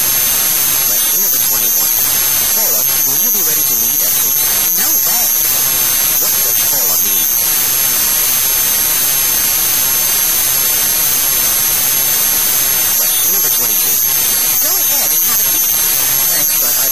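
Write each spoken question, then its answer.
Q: What does Paula mean?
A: She won't be ready to meet at 8.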